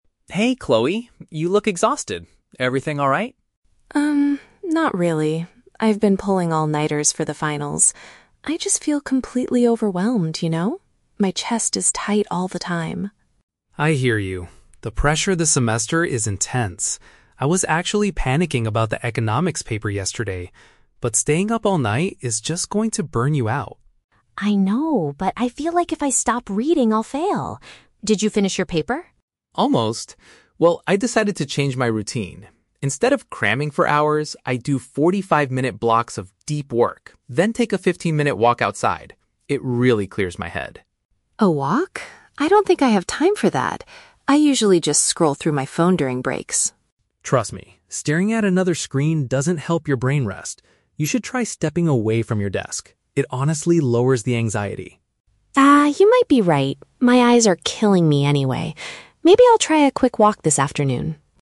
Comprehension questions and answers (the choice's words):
Listen to a conversation between two classmates and choose the correct answer (A, B, or C) for each question.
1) Why is Chloe feeling overwhelmed?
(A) She failed her final exams.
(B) She has been studying without enough sleep.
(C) She is struggling to write her Economics paper.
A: She has been studying without enough sleep.

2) What does Liam suggest Chloe do during her study breaks?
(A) Look at social media on her phone.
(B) Spend some time outdoors.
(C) Take a nap for 45 minutes.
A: Spend some time outdoors.

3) How does Chloe respond to Liam's advice at the end of the conversation?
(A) She refuses to change her current study habits.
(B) She agrees to give his suggestion a try.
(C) She complains that his method takes up too much time.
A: She agrees to give his suggestion a try.

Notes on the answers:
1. The Key: Chloe says she has been "pulling all-nighters" (staying awake all night to study), which matches "studying without enough sleep". The Trap (C): Economics is mentioned in the audio, but it was Liam who was panicking about the Economics paper, not Chloe. The Trap (A): Plausible, but incorrect. She is afraid she will fail if she stops reading, but she hasn't failed yet.
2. The Key: Liam suggests taking a "walk outside" and "stepping away from your desk". This is paraphrased as "Spend some time outdoors". The Trap (A): Looking at her phone is what Chloe currently does, and Liam explicitly advises against it ("staring at another screen doesn't help"). The Trap (C): 45 minutes is mentioned, but it is the amount of time Liam spends doing "deep work", not sleeping.
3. The Key: At the end, Chloe says "you might be right" and "Maybe I'll try a quick walk this afternoon". This shows she is willing to try his advice. The Trap (C): Chloe initially says "I don't think I have time for that" (the twist/change of mind), but she changes her opinion by the end of the conversation. The Trap (A): She does not refuse; she accepts the advice because her "eyes are killing" her.

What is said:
Liam: Hey, Chloe. You look exhausted. Everything alright?
Chloe: Um, not really. I've been pulling all-nighters for the finals. I just feel completely overwhelmed, you know? My chest is tight all the time.
Liam: I hear you. The pressure this semester is intense. I was actually panicking about the Economics paper yesterday. But staying up all night is just going to burn you out.
Chloe: I know, but I feel like if I stop reading, I'll fail. Did you finish your paper?
Liam: Almost. Well, I decided to change my routine. Instead of cramming for hours, I do 45-minute blocks of deep work, then take a 15-minute walk outside. It really clears my head.
Chloe: A walk? I don't think I have time for that. I usually just scroll through my phone during breaks.
Liam: Trust me, staring at another screen doesn't help your brain rest. You should try stepping away from your desk. It honestly lowers the anxiety.
Chloe: Ah, you might be right. My eyes are killing me anyway. Maybe I'll try a quick walk this afternoon.